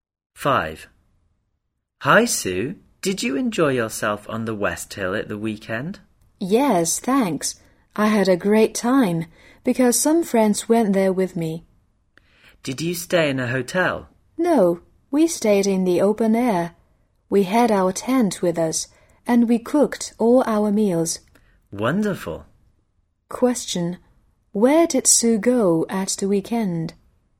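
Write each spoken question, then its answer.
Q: Where did Sue go at the weekend?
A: The West Hill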